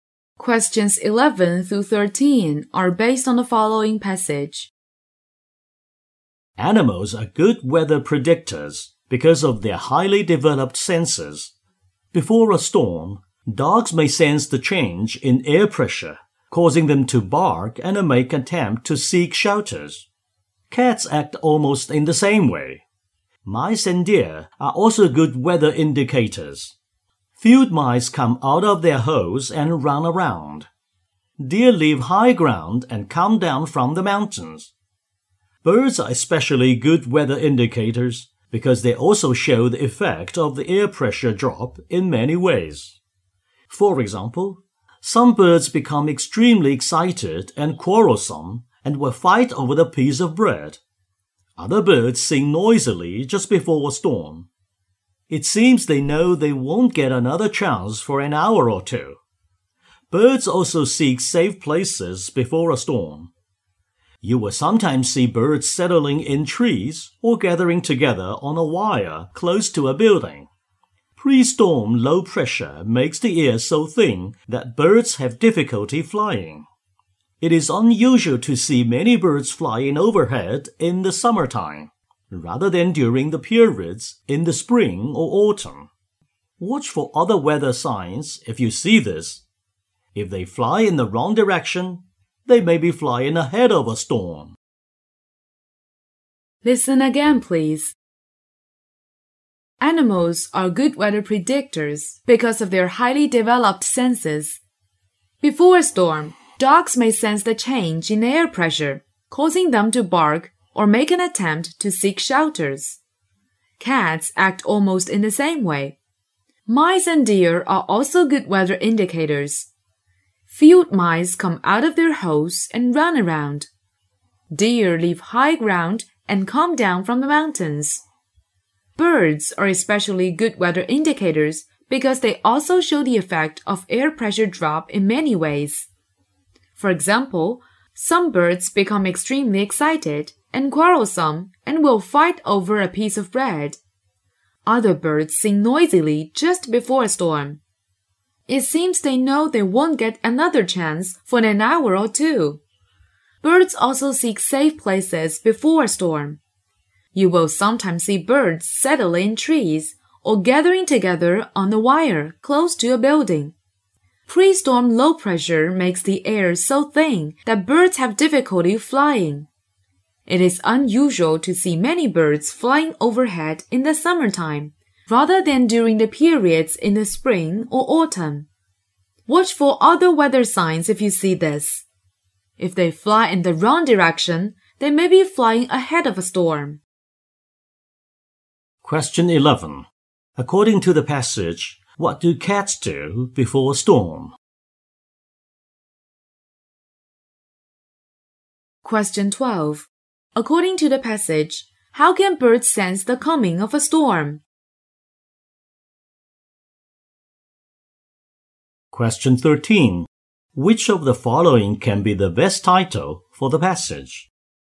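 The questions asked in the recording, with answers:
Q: According to the passage, what do cats do before a storm?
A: The same as dogs: bark and seek shelter

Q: According to the passage, how can birds sense the coming of a storm?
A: By sensing the drop in air pressure

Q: Which of the following can be the best title for the passage?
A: Animals as weather predictors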